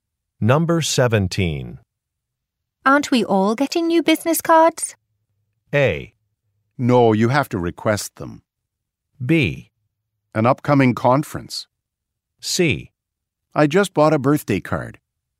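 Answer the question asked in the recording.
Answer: A: No, you have to request them.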